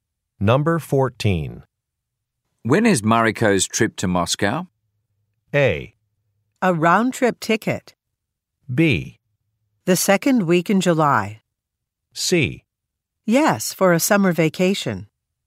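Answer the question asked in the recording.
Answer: B: The second week in July.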